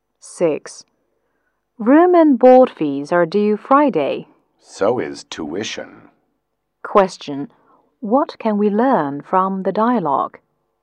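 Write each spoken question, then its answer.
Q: What can we learn from the dialogue?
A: Room and board fees and tuition are all due Friday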